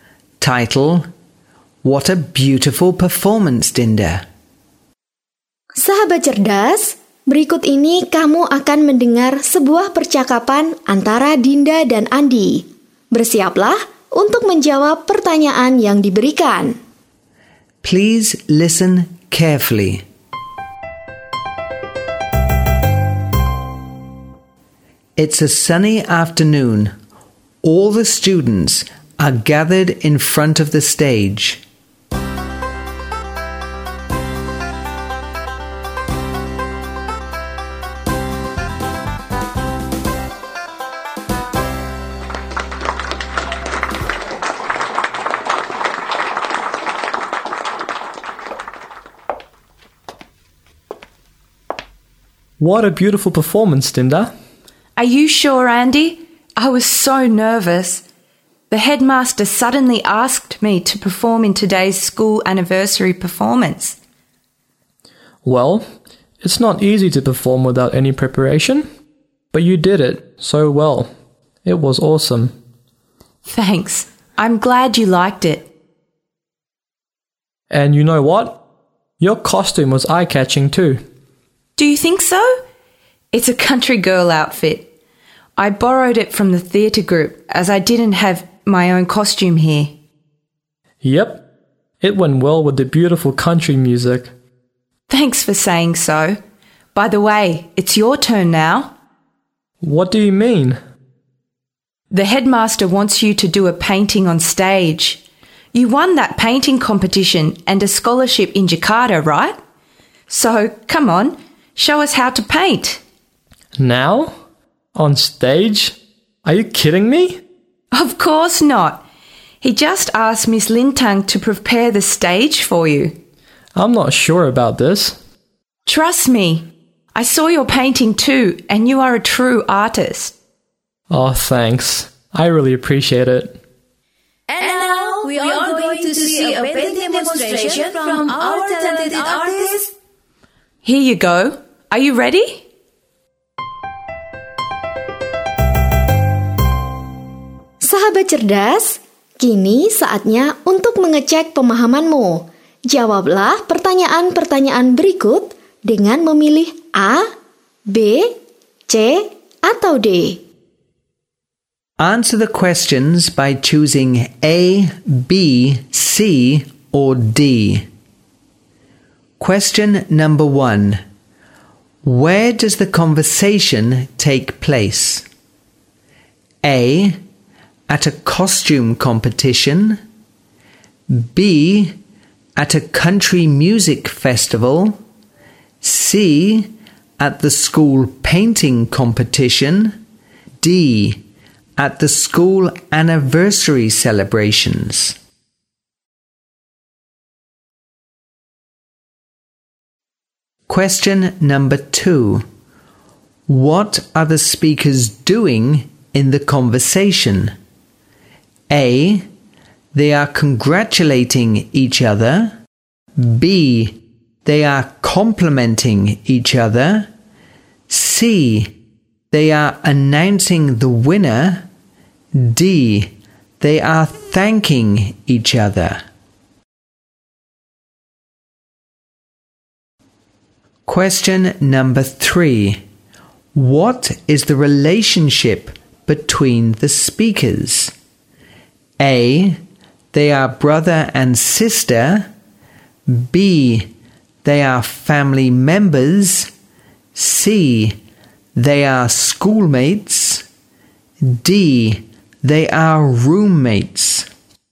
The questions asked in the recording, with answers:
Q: Where does the conversation take place?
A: D. At the school anniversary celebrations.

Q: What are the speakers doing in the conversation?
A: B. They are complimenting each other.